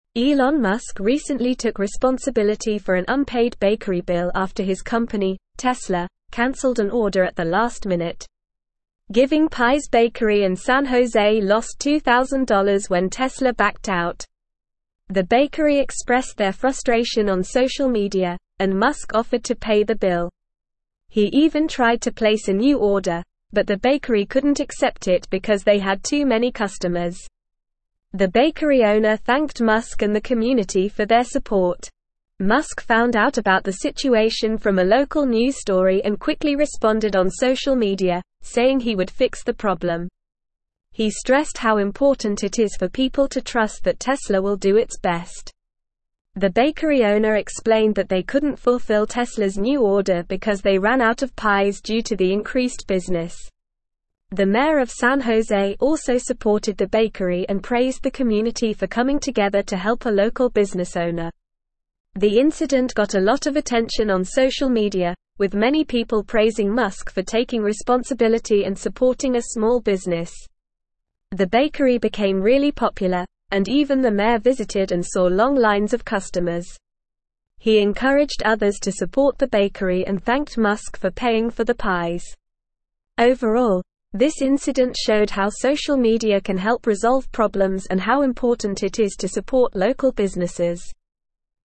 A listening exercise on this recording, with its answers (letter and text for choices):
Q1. Elon Musk recently took responsibility for an unpaid bakery bill after his company, Tesla, cancelled an order at the last (1)______.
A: minute

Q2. (2)______ Pies bakery in San Jose lost $2,000 when Tesla backed out.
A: Giving

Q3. The bakery (3)______ their (4)______ on social media, and Musk offered to pay the bill.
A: expressed

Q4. The bakery (3)______ their (4)______ on social media, and Musk offered to pay the bill.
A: frustration

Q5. He even tried to place a new order, but the bakery couldn't accept it because they had too many (5)______.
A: customers

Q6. The (6)______ owner thanked Musk and the community for their support.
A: bakery

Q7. Musk found out about the (7)______ from a local news story and quickly responded on (8)______ media, saying he would fix the problem.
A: situation

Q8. Musk found out about the (7)______ from a local news story and quickly responded on (8)______ media, saying he would fix the problem.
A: social

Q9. The bakery owner explained that they couldn't (9)______ Tesla's new order because they ran out of pies due to the (10)______ business.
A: fulfill

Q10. The bakery owner explained that they couldn't (9)______ Tesla's new order because they ran out of pies due to the (10)______ business.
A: increased

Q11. The (11)______ of San Jose also supported the bakery and praised the community for coming together to help a local business owner.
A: mayor

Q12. The incident got a lot of attention on social media, with many (12)______ praising Musk for taking responsibility and supporting a (13)______ business.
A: people

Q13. The incident got a lot of attention on social media, with many (12)______ praising Musk for taking responsibility and supporting a (13)______ business.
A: small

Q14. He encouraged others to support the bakery and thanked Musk for (14)______ for the pies.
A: paying

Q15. Overall, this (15)______ showed how social media can help resolve (16)______ and how important it is to support local businesses.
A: incident

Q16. Overall, this (15)______ showed how social media can help resolve (16)______ and how important it is to support local businesses.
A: problems

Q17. Why did Giving Pies bakery lose $2,000?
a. The bakery ran out of pies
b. Tesla cancelled an order at the last minute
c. The bakery had too many customers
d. Musk refused to pay the bill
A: b. Tesla cancelled an order at the last minute

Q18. How did Elon Musk find out about the unpaid bakery bill?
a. From a social media post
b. From a local news story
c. From the bakery owner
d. From the mayor of San Jose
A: b. From a local news story

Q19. Why couldn't the bakery accept Musk's new order?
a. They ran out of pies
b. They didn't want to do business with Tesla anymore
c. Musk didn't offer to pay for it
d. They had too many customers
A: d. They had too many customers

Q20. How did Musk respond to the situation?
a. He criticized the bakery on social media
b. He ignored the bakery's frustration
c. He blamed the mayor for the issue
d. He offered to pay the bakery bill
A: d. He offered to pay the bakery bill

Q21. What did the mayor of San Jose do to support the bakery?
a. He paid for the bakery bill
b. He criticized Musk for his actions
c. He praised the community for helping the bakery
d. He encouraged people to stop supporting the bakery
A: c. He praised the community for helping the bakery

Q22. Why did the incident get a lot of attention on social media?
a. Many people praised Musk for taking responsibility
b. The bakery became really popular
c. The mayor visited the bakery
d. The bakery ran out of pies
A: a. Many people praised Musk for taking responsibility

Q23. What did the bakery owner thank Musk and the community for?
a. Their criticism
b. Their lack of trust in Tesla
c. Their support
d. Their refusal to help the bakery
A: c. Their support

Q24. What did this incident show about social media and local businesses?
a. Social media can help resolve problems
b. Local businesses need more support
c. Local businesses should avoid social media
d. Social media is not important for local businesses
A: a. Social media can help resolve problems

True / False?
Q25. Musk refused to pay the bill and didn't attempt to place a new order.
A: False

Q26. The occurrence went unnoticed on social media and didn't help the bakery gain popularity.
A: False

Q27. The deputy of San Jose endorsed the bakery and commended the community.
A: False

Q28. Musk found out about the situation from a local news story.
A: True

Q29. The bakery expressed their frustration on social media.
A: True

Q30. The bakery gained $2,000 when Tesla backed out of the order.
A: False

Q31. The bakery couldn't accept the new order because they had too many customers.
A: True

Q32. Elon Musk paid for a bakery bill after his company cancelled an order.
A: True

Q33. What happened to the bakery when Tesla cancelled their order?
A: The bakery lost $2,000 when Tesla cancelled their order at the last minute.

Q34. How did Elon Musk find out about the unpaid bill?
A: Elon Musk found out about the unpaid bill from a local news story.

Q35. Why couldn't the bakery accept Tesla's new order?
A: The bakery couldn't accept Tesla's new order because they had too many customers and ran out of pies.

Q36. How did Elon Musk respond to the situation on social media?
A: Elon Musk responded to the situation on social media by offering to pay the bakery bill and expressing the importance of trust in Tesla.

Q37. Why did the mayor of San Jose support the bakery?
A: The mayor of San Jose supported the bakery because he praised the community for coming together to help a local business owner.

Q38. How did the incident gain attention on social media?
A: The incident gained attention on social media because the bakery expressed their frustration on social media, and people praised Elon Musk for taking responsibility.

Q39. What did the mayor do after the incident?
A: After the incident, the mayor visited the bakery and encouraged others to support it.

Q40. What did this incident show about the importance of social media and supporting local businesses?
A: This incident showed how social media can help resolve problems and how important it is to support local businesses.

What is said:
Elon Musk recently took responsibility for an unpaid bakery bill after his company, Tesla, cancelled an order at the last minute. Giving Pies bakery in San Jose lost $2,000 when Tesla backed out. The bakery expressed their frustration on social media, and Musk offered to pay the bill. He even tried to place a new order, but the bakery couldn't accept it because they had too many customers. The bakery owner thanked Musk and the community for their support.
Musk found out about the situation from a local news story and quickly responded on social media, saying he would fix the problem. He stressed how important it is for people to trust that Tesla will do its best. The bakery owner explained that they couldn't fulfill Tesla's new order because they ran out of pies due to the increased business. The mayor of San Jose also supported the bakery and praised the community for coming together to help a local business owner.
The incident got a lot of attention on social media, with many people praising Musk for taking responsibility and supporting a small business. The bakery became really popular, and even the mayor visited and saw long lines of customers. He encouraged others to support the bakery and thanked Musk for paying for the pies. Overall, this incident showed how social media can help resolve problems and how important it is to support local businesses.

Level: Level 3